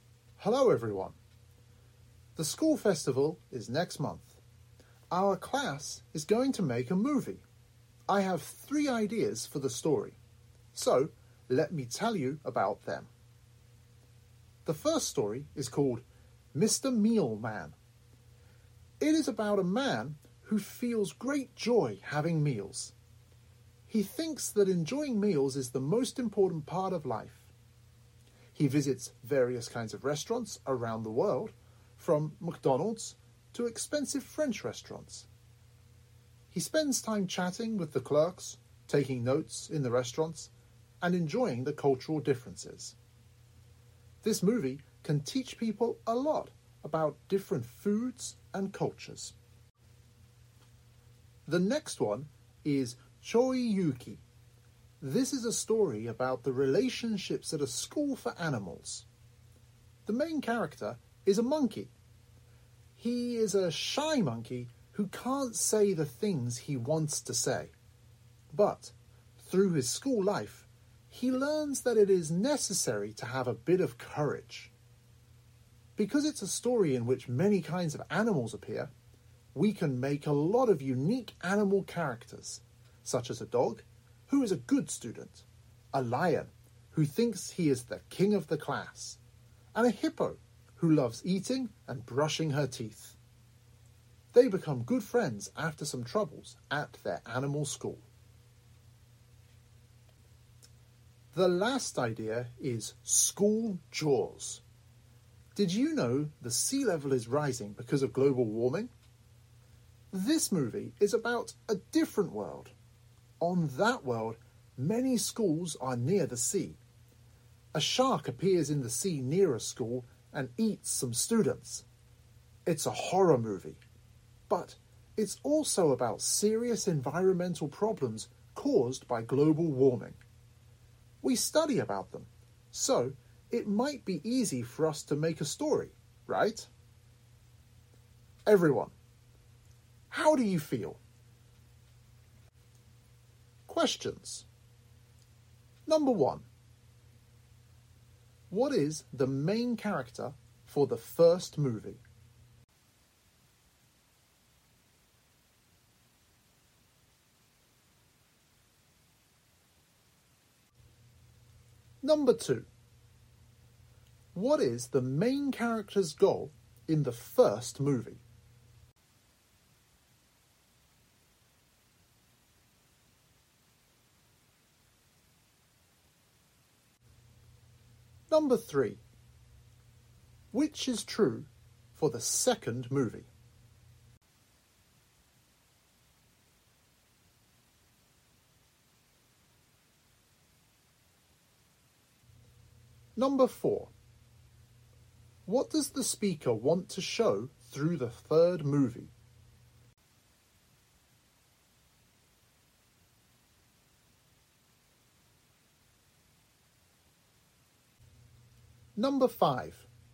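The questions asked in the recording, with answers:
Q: What is the main character for the first movie?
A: A man who feels great joy having meals

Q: What does the speaker want to show through the third movie?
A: Serious environmental problems caused by global warming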